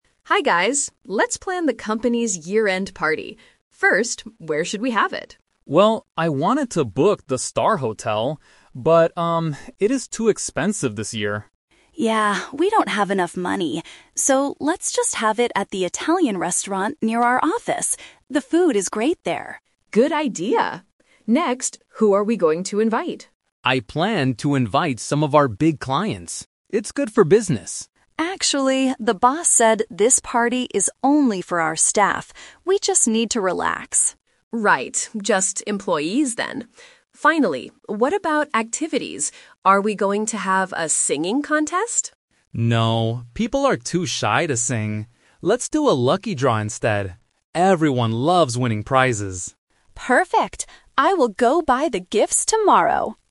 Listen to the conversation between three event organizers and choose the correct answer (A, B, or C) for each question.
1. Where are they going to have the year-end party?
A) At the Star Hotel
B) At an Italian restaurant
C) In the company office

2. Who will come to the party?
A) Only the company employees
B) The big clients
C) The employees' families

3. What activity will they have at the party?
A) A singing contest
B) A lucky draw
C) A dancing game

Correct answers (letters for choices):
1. B
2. A
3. B

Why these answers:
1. Tom says he wanted to book the Star Hotel (The Trap). However, he changes his mind because it is too expensive. Emma then suggests the "Italian restaurant near our office," and Lisa agrees. The company office is not the location for the party.
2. Tom suggests inviting the big clients (The Trap). But Emma corrects him by saying the boss wants the party "only for our staff" (staff = employees). Lisa confirms this. The employees' families are not mentioned.
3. Lisa asks if they are going to have a singing contest (The Trap). Tom rejects this idea because people are too shy. He uses "instead" to introduce the final decision: "Let's do a lucky draw." A dancing game is not mentioned in the audio.

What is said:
Lisa: Hi guys, let's plan the company's year-end party. First, where should we have it?
Tom: Well, I wanted to book the Star Hotel. But, um, it is too expensive this year.
Emma: Yeah, we don't have enough money. So, let's just have it at the Italian restaurant near our office. The food is great there.
Lisa: Good idea! Next, who are we going to invite?
Tom: I planned to invite some of our big clients. It's good for business.
Emma: Actually, the boss said this party is only for our staff. We just need to relax.
Lisa: Right, just employees then. Finally, what about activities? Are we going to have a singing contest?
Tom: No, people are too shy to sing. Let's do a lucky draw instead. Everyone loves winning prizes.